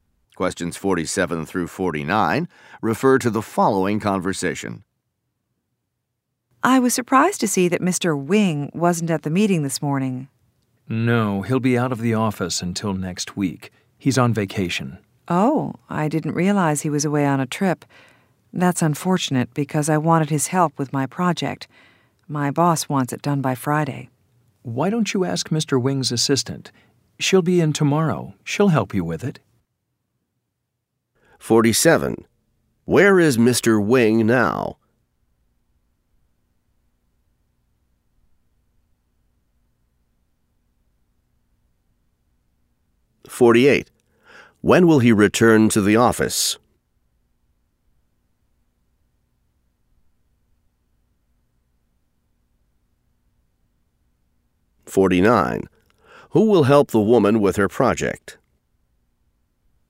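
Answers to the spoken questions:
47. On vacation
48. Next week
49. Mr. Wing's assistant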